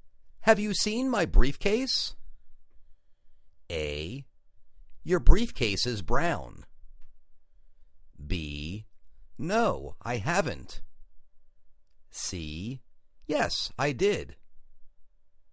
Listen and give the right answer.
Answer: No, I haven't